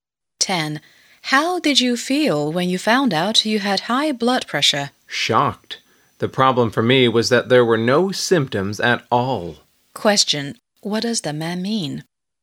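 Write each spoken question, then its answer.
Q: What does the man mean?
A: He was shocked because he had no symptoms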